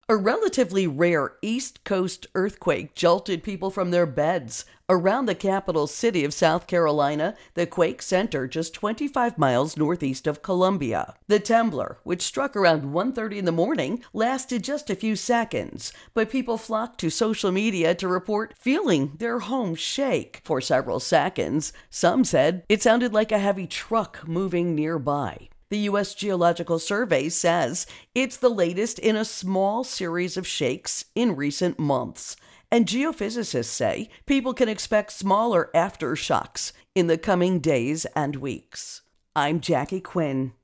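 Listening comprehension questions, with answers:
Listen to the audio first then answer the following questions in around 50 words for each answer.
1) What are geophysicists saying to people in South Carolina?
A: People can expect smaller aftershocks in the coming days and weeks.

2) Where did the earthquake strike?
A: About 25 miles northeast of Columbia, the capital of South Carolina.

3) When did the earthquake strike?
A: Around 1:30 in the morning.

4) According to reports on social media, what did the earthquake sound like?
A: A heavy truck moving nearby.

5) What did many people do after they felt the earthquake?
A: They flocked to social media to report feeling their homes shake.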